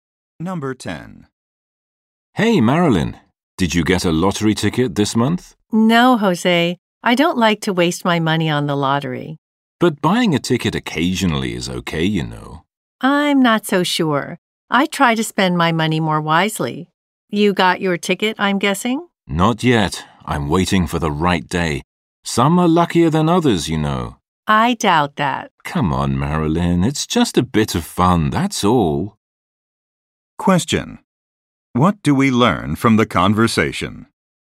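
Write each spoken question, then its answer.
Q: What do we learn from the conversation?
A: Jose believes some days are luckier than others for buying a lottery ticket, but Marilyn doubts it.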